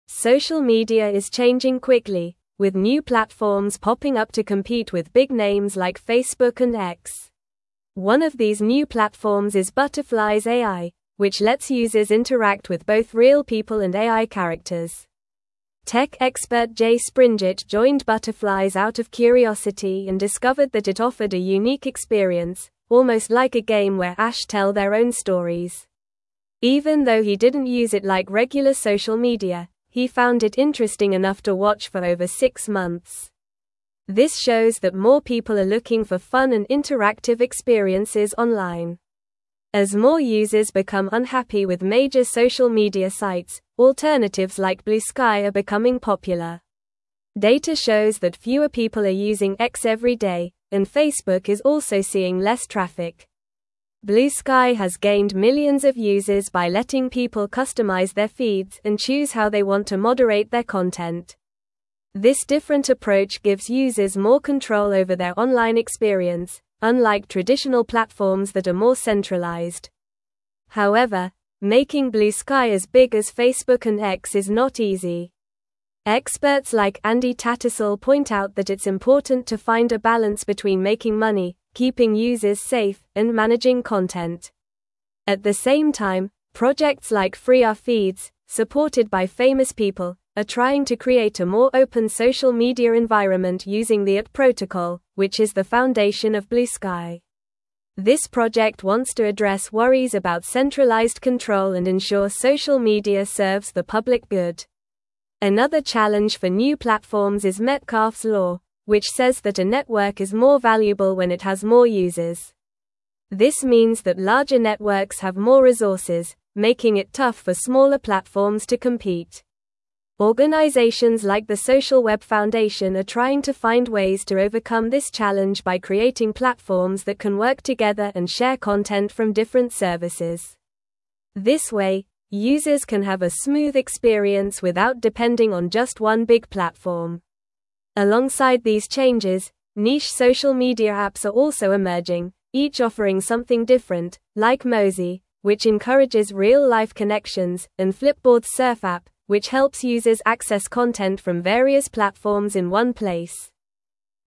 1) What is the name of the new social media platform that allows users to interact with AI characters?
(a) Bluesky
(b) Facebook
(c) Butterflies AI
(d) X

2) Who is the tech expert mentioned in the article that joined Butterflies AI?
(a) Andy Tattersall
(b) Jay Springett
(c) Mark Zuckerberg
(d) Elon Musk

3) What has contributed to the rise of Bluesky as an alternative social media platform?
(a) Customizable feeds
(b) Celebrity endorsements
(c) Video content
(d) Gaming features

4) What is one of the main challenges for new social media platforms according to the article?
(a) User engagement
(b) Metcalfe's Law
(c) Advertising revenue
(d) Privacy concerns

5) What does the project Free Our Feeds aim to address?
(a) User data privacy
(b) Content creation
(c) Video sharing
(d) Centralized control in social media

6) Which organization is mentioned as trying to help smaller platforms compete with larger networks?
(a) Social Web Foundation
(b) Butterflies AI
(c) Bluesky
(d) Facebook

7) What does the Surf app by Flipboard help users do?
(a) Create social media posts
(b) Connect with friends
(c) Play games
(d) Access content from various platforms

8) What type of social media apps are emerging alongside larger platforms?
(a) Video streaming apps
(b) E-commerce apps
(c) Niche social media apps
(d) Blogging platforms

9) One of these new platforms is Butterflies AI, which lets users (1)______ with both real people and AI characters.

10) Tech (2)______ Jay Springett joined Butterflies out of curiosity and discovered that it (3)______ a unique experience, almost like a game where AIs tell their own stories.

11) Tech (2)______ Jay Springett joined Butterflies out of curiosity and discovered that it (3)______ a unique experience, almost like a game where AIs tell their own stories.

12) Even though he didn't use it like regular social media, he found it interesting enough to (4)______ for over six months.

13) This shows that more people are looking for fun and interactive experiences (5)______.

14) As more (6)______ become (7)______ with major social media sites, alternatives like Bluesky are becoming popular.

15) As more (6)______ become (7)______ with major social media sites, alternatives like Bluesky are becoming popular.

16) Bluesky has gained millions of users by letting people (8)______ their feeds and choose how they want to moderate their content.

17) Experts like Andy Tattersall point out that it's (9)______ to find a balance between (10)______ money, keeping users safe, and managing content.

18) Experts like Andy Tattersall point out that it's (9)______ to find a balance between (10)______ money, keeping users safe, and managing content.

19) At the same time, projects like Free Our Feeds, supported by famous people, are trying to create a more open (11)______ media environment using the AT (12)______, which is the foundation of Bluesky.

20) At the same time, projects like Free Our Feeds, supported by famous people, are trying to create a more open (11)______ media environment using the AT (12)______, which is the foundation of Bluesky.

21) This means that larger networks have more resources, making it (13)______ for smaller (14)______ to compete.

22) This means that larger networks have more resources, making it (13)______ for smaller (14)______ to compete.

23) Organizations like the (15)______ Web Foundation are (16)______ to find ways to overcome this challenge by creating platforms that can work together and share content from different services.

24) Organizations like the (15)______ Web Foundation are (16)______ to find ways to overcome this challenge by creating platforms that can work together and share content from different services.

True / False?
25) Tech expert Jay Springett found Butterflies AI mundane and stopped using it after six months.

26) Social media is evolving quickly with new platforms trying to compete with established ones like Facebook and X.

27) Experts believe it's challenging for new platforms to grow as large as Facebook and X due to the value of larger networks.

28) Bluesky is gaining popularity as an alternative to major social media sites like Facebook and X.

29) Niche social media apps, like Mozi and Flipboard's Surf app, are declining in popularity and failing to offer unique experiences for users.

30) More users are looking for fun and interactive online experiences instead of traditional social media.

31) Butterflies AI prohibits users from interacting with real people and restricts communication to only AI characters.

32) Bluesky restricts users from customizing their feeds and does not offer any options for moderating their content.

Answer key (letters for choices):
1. c
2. b
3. a
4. b
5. d
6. a
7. d
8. c
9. interact
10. expert
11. offered
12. watch
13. online
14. users
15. unhappy
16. customize
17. important
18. making
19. social
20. Protocol
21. tough
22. platforms
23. Social
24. trying
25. False
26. True
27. True
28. True
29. False
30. True
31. False
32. False

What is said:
Social media is changing quickly, with new platforms popping up to compete with big names like Facebook and X. One of these new platforms is Butterflies AI, which lets users interact with both real people and AI characters. Tech expert Jay Springett joined Butterflies out of curiosity and discovered that it offered a unique experience, almost like a game where AIs tell their own stories. Even though he didn't use it like regular social media, he found it interesting enough to watch for over six months. This shows that more people are looking for fun and interactive experiences online.
As more users become unhappy with major social media sites, alternatives like Bluesky are becoming popular. Data shows that fewer people are using X every day, and Facebook is also seeing less traffic. Bluesky has gained millions of users by letting people customize their feeds and choose how they want to moderate their content. This different approach gives users more control over their online experience, unlike traditional platforms that are more centralized.
However, making Bluesky as big as Facebook and X is not easy. Experts like Andy Tattersall point out that it's important to find a balance between making money, keeping users safe, and managing content. At the same time, projects like Free Our Feeds, supported by famous people, are trying to create a more open social media environment using the AT Protocol, which is the foundation of Bluesky. This project wants to address worries about centralized control and ensure social media serves the public good.
Another challenge for new platforms is Metcalfe's Law, which says that a network is more valuable when it has more users. This means that larger networks have more resources, making it tough for smaller platforms to compete. Organizations like the Social Web Foundation are trying to find ways to overcome this challenge by creating platforms that can work together and share content from different services. This way, users can have a smooth experience without depending on just one big platform. Alongside these changes, niche social media apps are also emerging, each offering something different, like Mozi, which encourages real-life connections, and Flipboard's Surf app, which helps users access content from various platforms in one place.

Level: Level 3